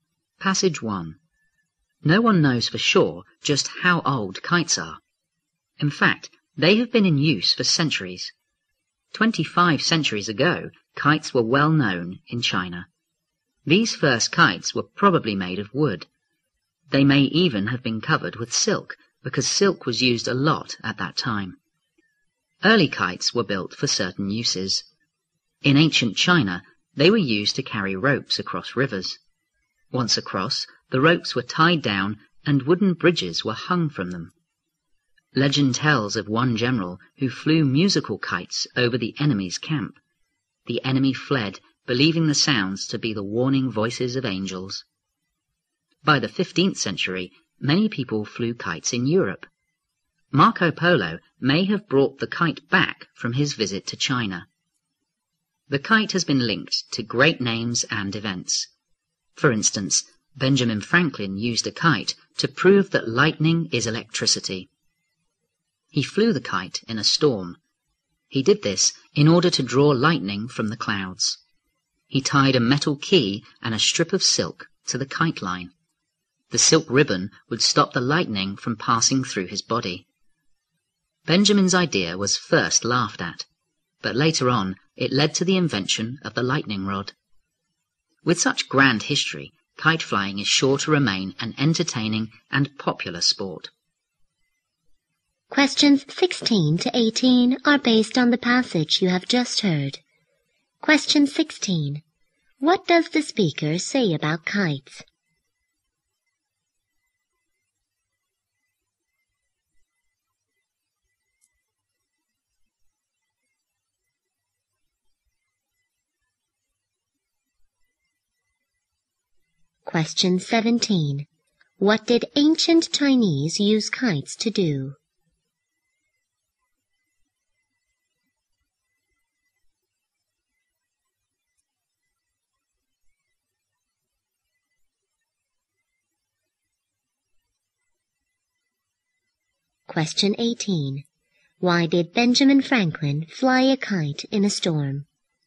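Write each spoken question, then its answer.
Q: What does the speaker say about kites?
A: They have been used for centuries; no one knows exactly how old they are.

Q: What did ancient Chinese use kites to do?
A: To carry ropes across rivers.

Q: Why did Benjamin Franklin fly a kite in a storm?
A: To draw lightning from the clouds and prove lightning is electricity.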